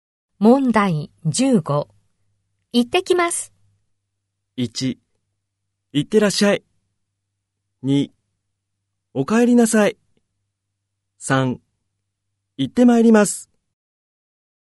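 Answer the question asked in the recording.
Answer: 1: 行ってらっしゃい。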